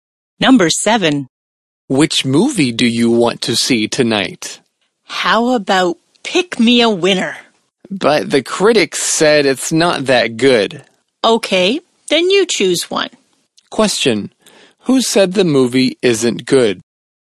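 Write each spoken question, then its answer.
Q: Who said the movie isn't good?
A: The critics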